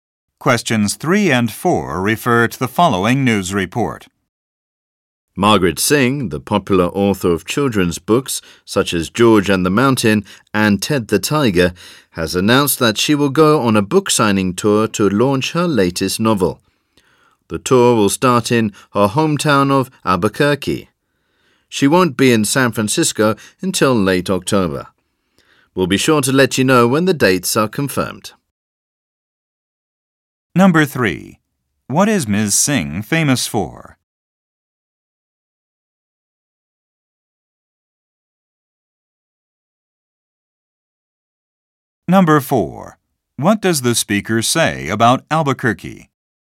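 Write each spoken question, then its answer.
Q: What is Ms. Singh famous for?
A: Writing children's books

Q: What does the speaker say about Albuquerque?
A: It is Ms. Singh's hometown, where her tour will start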